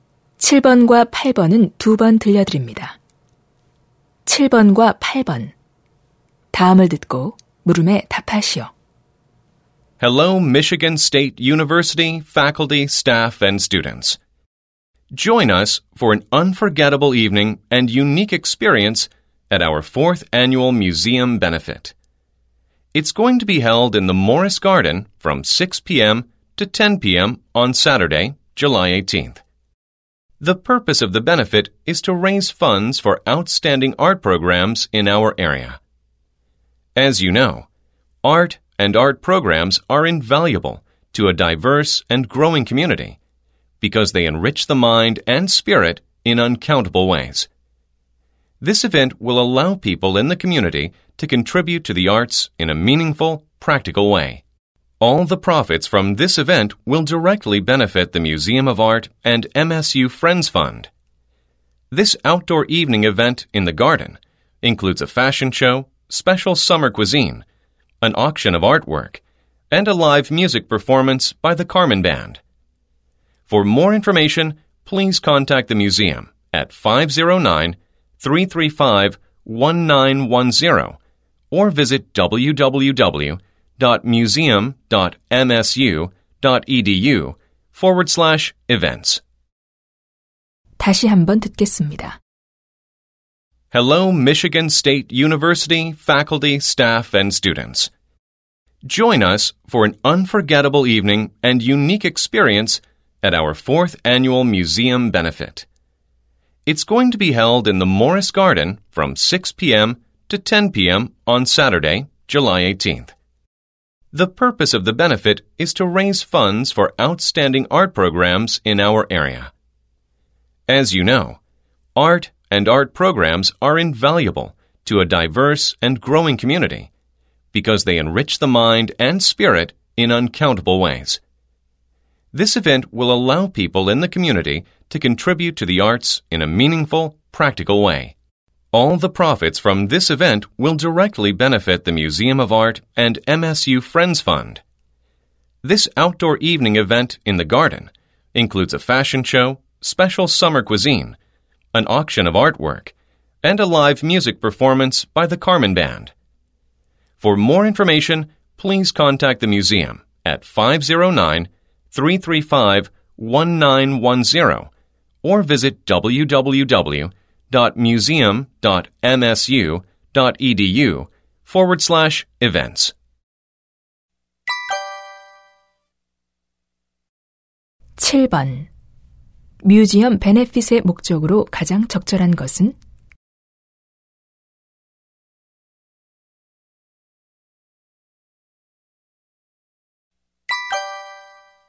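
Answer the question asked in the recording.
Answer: 지역의 우수한 예술 프로그램을 위한 기금 모금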